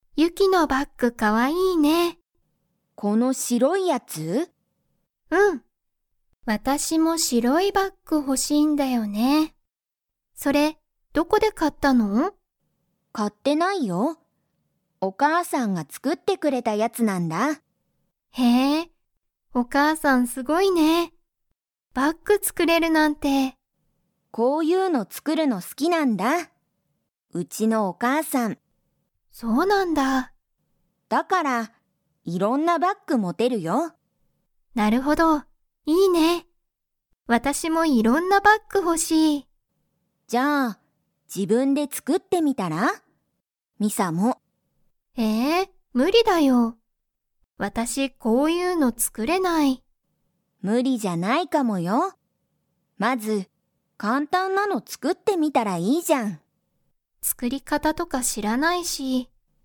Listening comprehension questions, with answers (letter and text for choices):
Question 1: ユキのバッグは 。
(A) 高たかい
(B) 大おおきい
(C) 白しろい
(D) 古ふるい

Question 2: ミサはバッグの作つくり方かたを知しっていますか?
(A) はい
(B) いいえ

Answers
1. (C) 白しろい
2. (B) いいえ

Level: Level 3